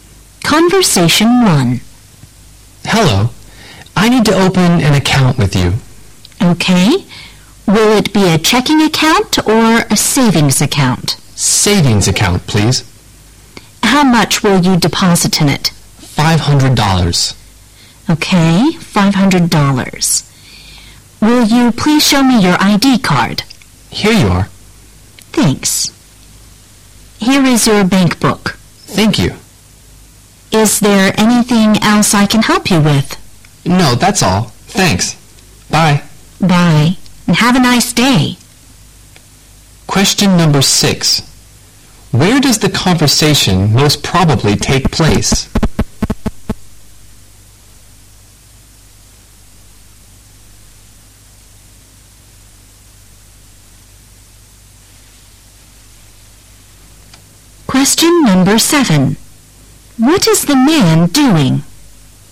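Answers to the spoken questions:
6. In a bank
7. Opening a savings account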